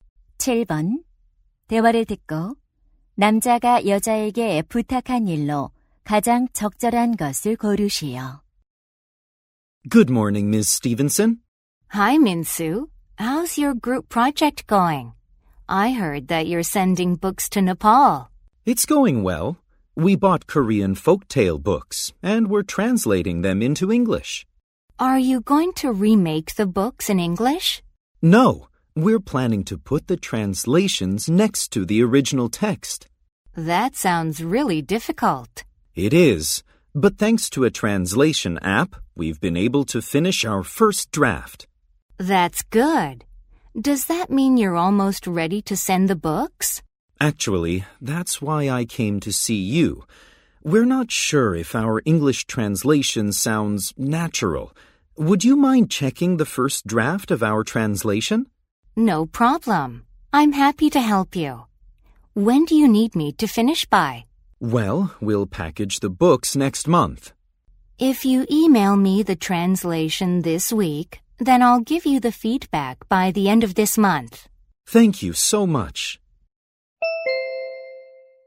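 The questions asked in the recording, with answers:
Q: 대화를 듣고 남자가 여자에게 부탁한 일로 가장 적절한 것을 고르시오.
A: 번역 초안 검토해 주기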